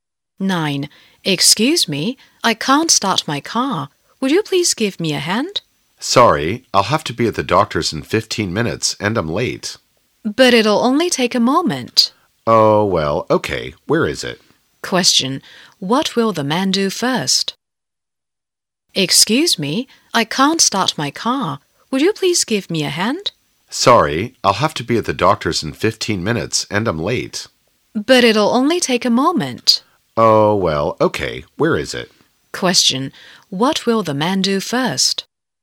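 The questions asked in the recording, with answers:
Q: Question. What will the man do first?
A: Help the woman start her car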